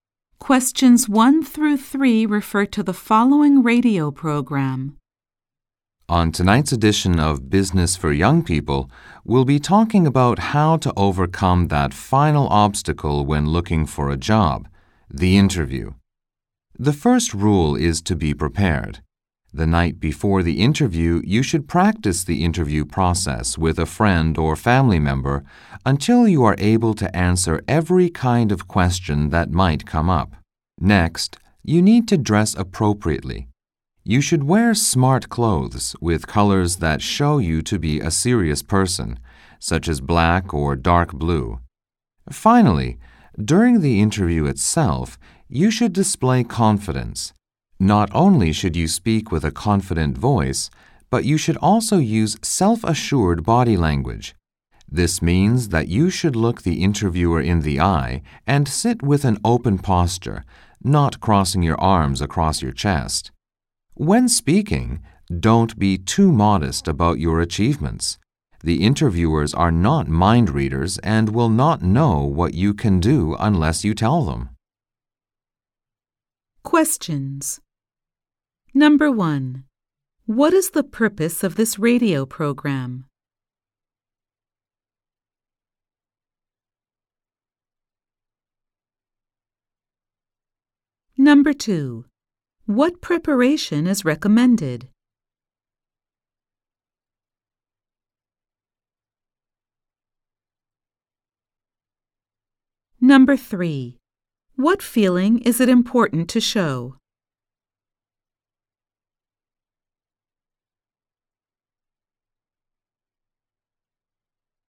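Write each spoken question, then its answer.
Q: What is the purpose of this radio program?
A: To give advice on job interviews

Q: What preparation is recommended?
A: Practicing the interview with a friend or family member the night before

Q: What feeling is it important to show?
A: Confidence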